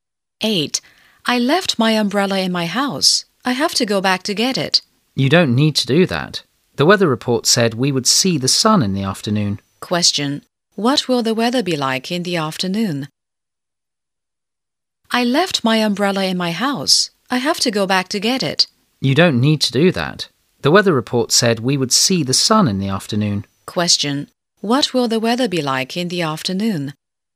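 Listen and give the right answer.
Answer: Sunny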